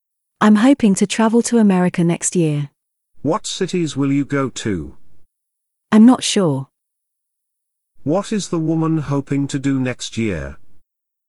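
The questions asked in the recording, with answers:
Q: What is the woman hoping to do next year?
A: Travel to America.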